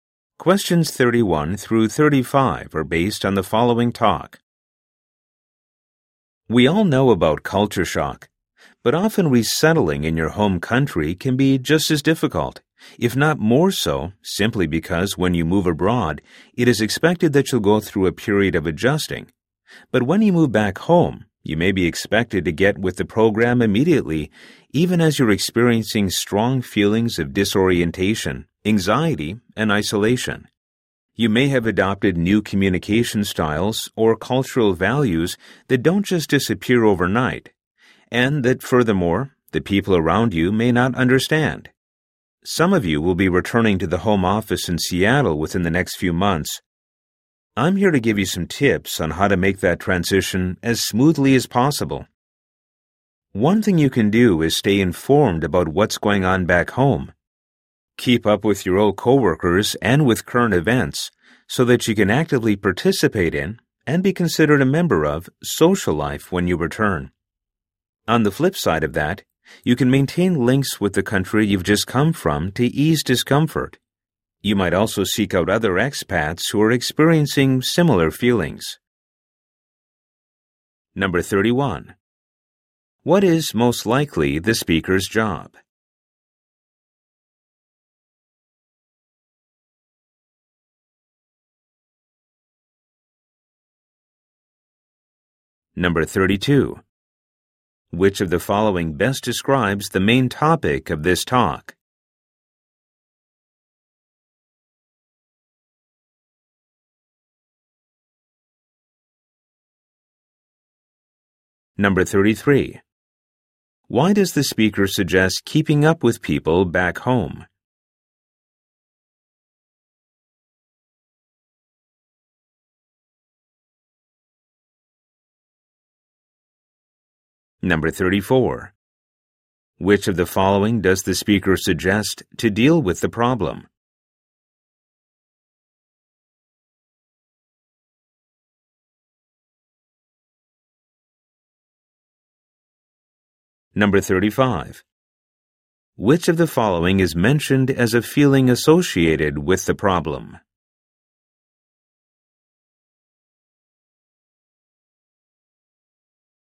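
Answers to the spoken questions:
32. Reverse culture shock when returning home
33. To participate in and be considered a member of social life on return
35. Disorientation, anxiety, or isolation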